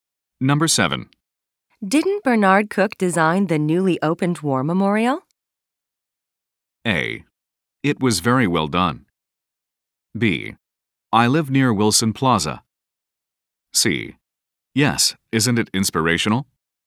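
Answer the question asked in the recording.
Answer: C: Yes, isn't it inspirational?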